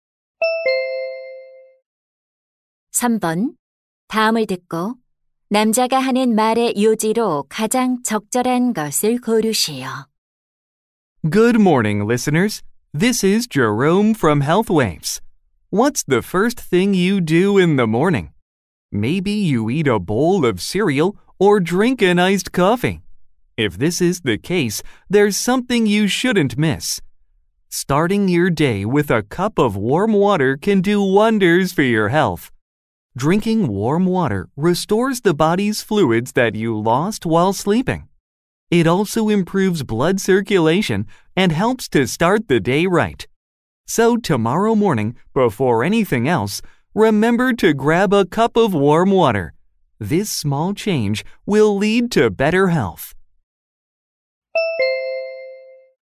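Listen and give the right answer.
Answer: 아침에 따뜻한 물 한 잔을 마시는 것은 건강에 좋다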